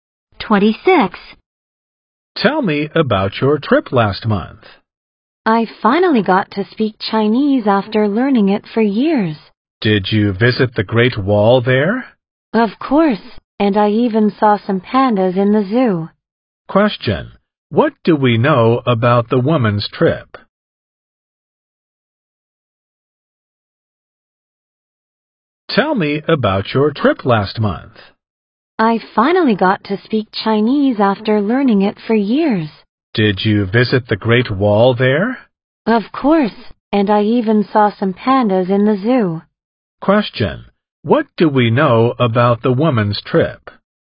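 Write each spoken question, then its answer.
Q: What do we know about the woman's trip?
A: She went to China, spoke Chinese, visited the Great Wall and saw pandas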